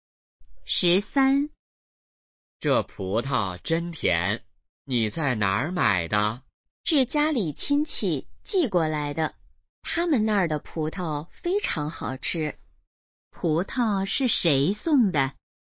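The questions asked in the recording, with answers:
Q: 葡萄是谁送的?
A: 家里亲戚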